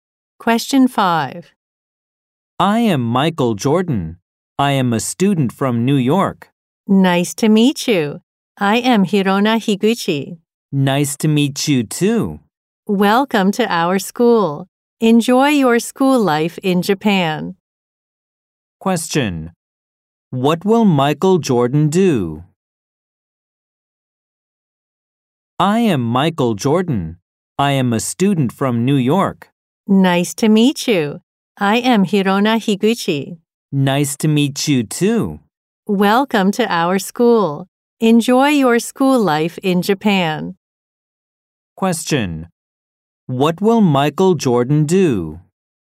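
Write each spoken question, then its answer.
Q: What will Michael Jordan do?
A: He will study at a school in Japan.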